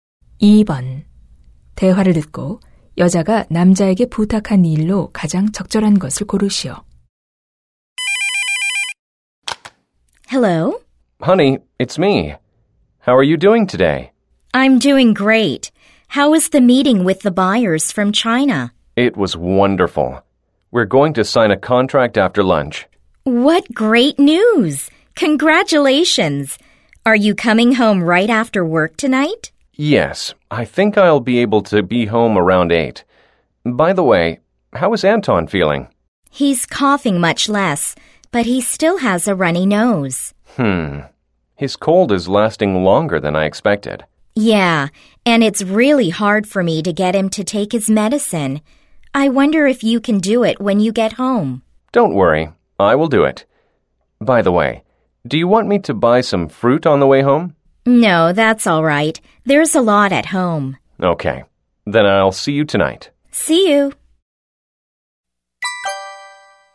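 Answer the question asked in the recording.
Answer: 아들(Anton)에게 약 먹이기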